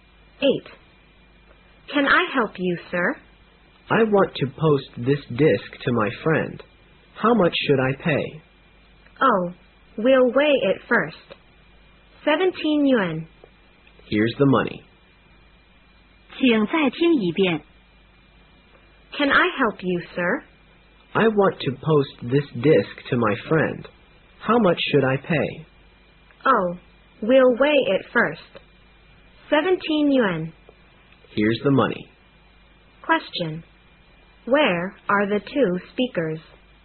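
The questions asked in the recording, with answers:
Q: Where are the two speakers?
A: In a post office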